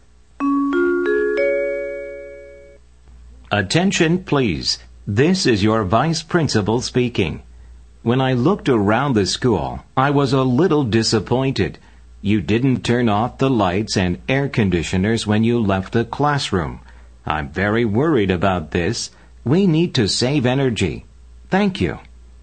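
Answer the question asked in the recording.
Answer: 에너지 절약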